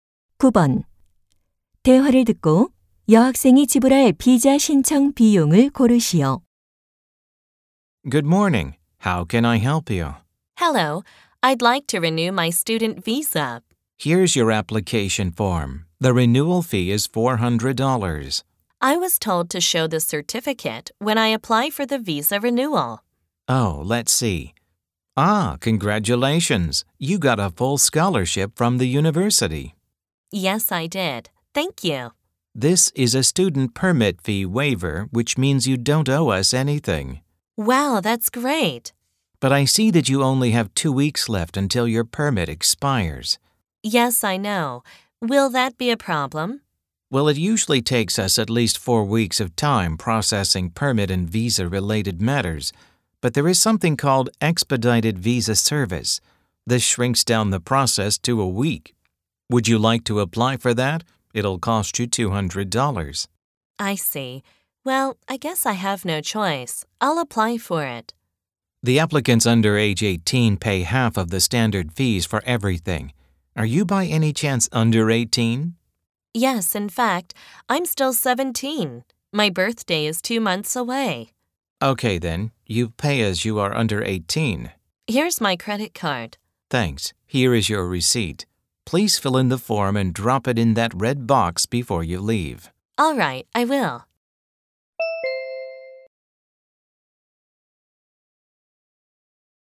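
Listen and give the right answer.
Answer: 100달러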